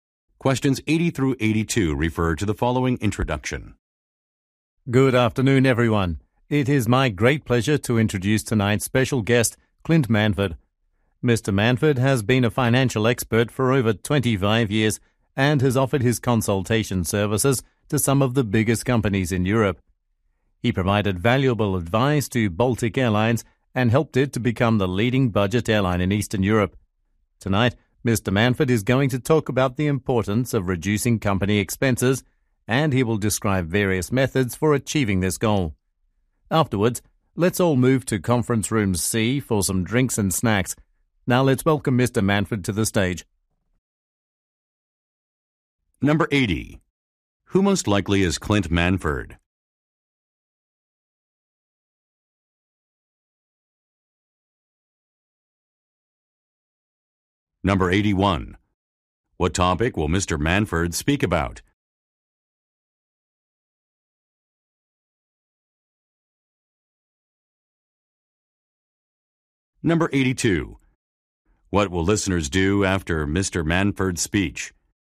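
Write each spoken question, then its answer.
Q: Who most likely is Clint Manford?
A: A financial consultant

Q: What will listeners do after Mr.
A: Go to Conference Room C for drinks and snacks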